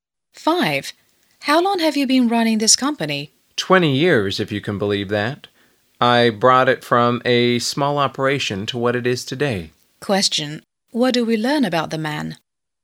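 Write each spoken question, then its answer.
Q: What do we learn about the man?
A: He has built the company up from a small operation over 20 years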